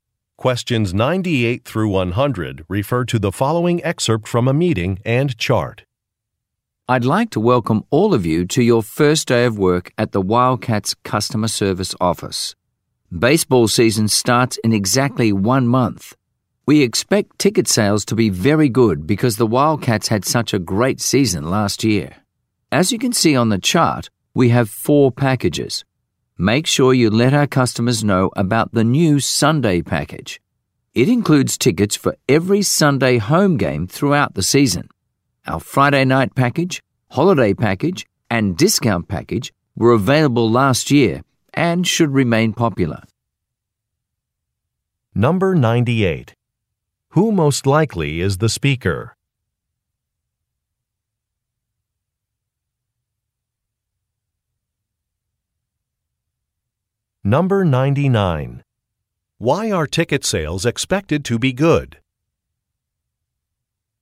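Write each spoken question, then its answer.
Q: Why are ticket sales expected to be good?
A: The team had a great season last year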